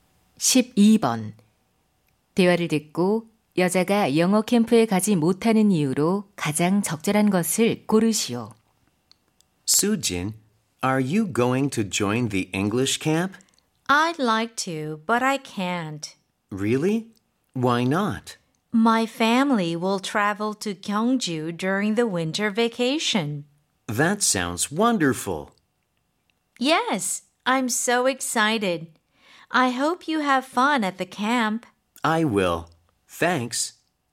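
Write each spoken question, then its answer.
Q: 대화를 듣고 여자가 영어 캠프에 가지 못하는 이유로 가장 적절한 것을 고르시오.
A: 겨울 방학에 가족이 경주로 여행을 가서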